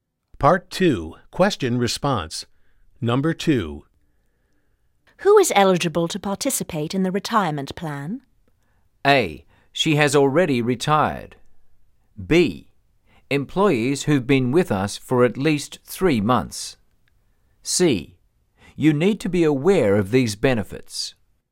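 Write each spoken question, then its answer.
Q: Who is eligible to participate in the retirement plan?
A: B: Employees who've been with us for at least 3 months.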